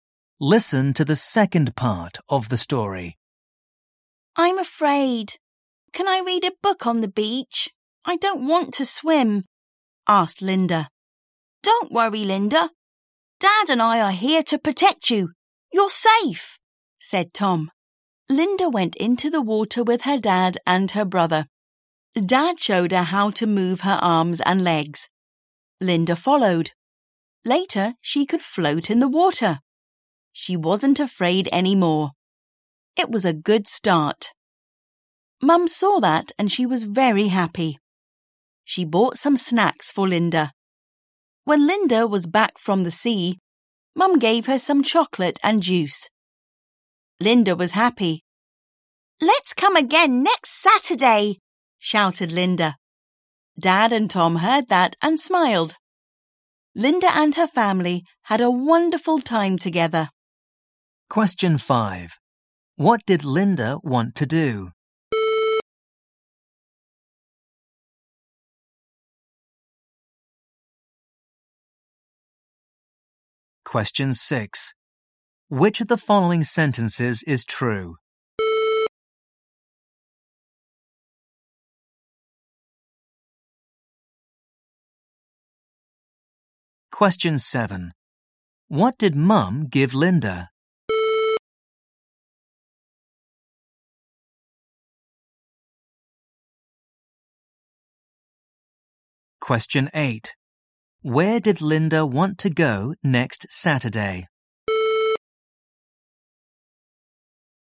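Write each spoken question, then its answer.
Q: What did Linda want to do?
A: Read a book on the beach

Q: What did Mum give Linda?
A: Some chocolate and juice

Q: Where did Linda want to go next Saturday?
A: To the beach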